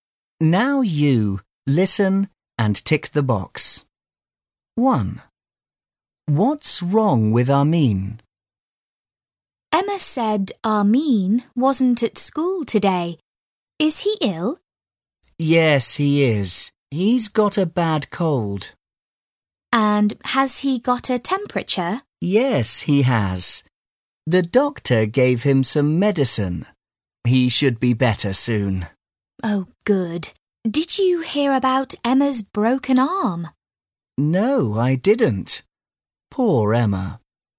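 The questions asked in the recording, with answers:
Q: What's wrong with Armin?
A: He's got a bad cold.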